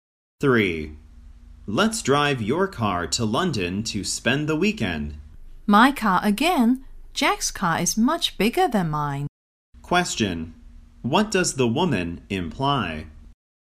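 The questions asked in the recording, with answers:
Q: What does the woman imply?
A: They should take Jack's car instead of hers.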